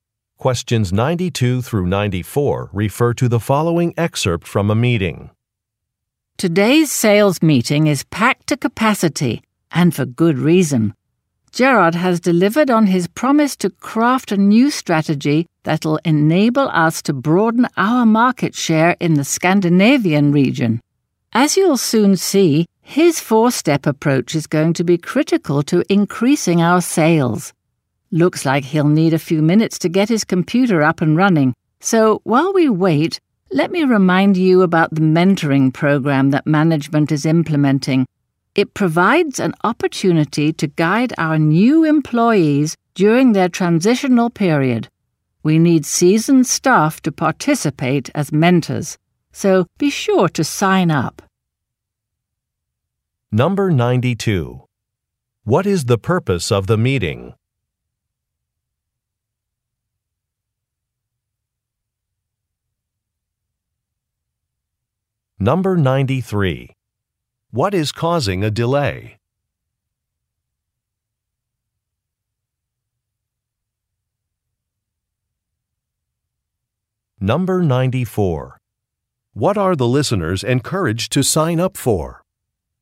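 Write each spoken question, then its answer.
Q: What is the purpose of the meeting?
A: To present a new sales strategy for the Scandinavian region

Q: What is causing a delay?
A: The presenter's computer is being set up

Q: What are the listeners encouraged to sign up for?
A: A mentoring program (as mentors)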